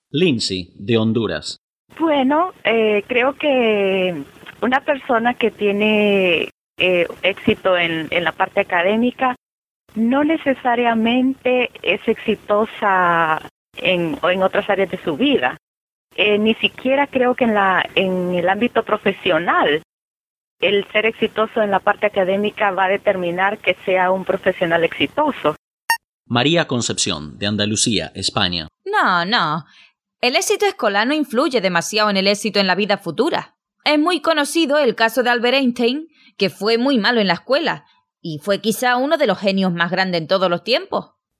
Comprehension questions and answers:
Listen to the audio as many times as you need to understand the gist of it. Then click on the tab below and decide if the statements below are true or false. If you need to listen again, go ahead and do so as many times as you need.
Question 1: Lindsay dice que tener éxito académicamente afecta otras áreas de la vida.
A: Falso

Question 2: Según ella, el éxito profesional va de la mano con el éxito académico.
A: Falso

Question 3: María Concepción coincide con Lindsay.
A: Verdadero

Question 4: María Concepción dice que Albert Einstein tuvo éxito en la vida porque fue brillante en la escuela.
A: Falso

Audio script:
Lindsay, de Honduras:
Bueno, creo que una persona que tiene éxito en la parte académica no necesariamente es exitosa en otras áreas de su vida. Ni siquiera creo que eh.. en la...en el ámbito profesional el ser exitoso en la parte académica va a determinar que sea un profesional exitoso.
María Concepción, de Andalucía, España:
No, no. El éxito escolar no influye demasiado en el éxito en la vida futura. Es bien conocido el caso de Albert Einstein que fue muy malo en la escuela y fue quizás uno de los genios más grandes de todos los tiempos.

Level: Advanced